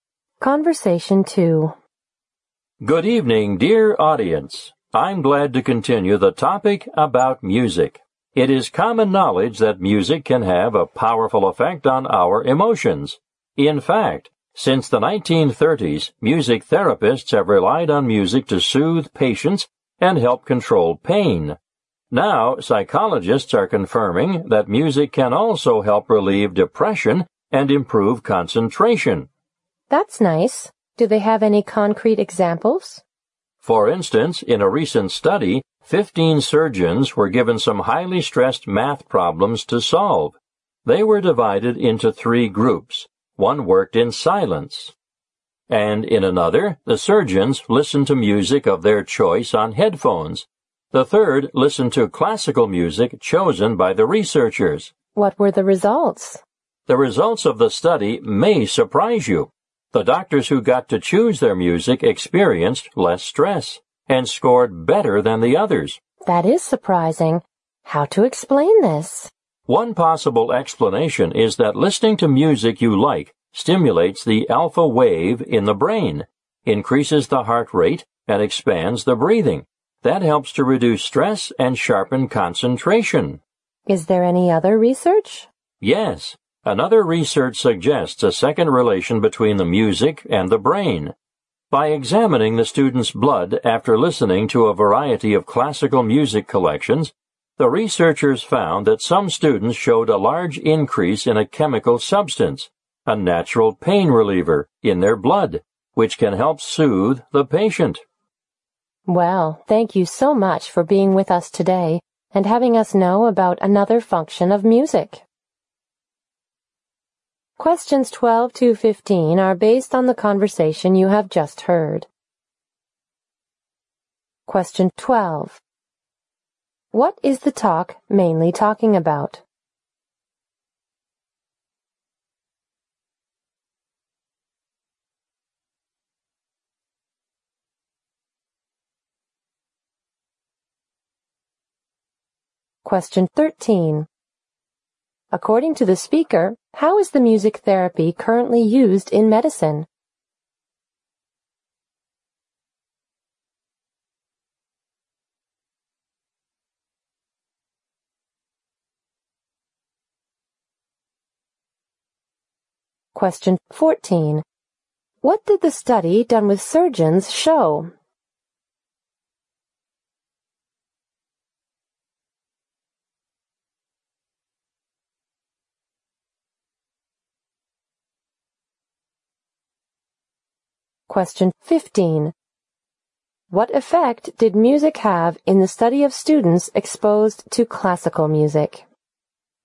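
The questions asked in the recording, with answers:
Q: What is the talk mainly talking about?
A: The effects of music on emotions and the brain

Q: According to the speaker, how is the music therapy currently used in medicine?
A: To soothe patients and help control pain

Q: What did the study done with surgeons show?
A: Surgeons who chose their own music felt less stress and scored better

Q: What effect did music have in the study of students exposed to classical music?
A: Some students had a large increase in a natural pain-relieving chemical in their blood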